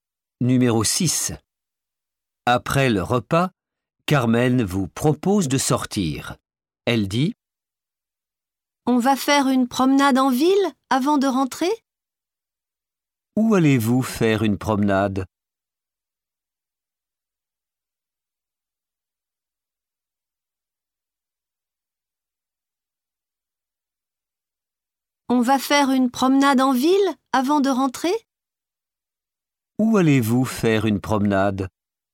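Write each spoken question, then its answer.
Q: Où allez-vous faire une promenade?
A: En ville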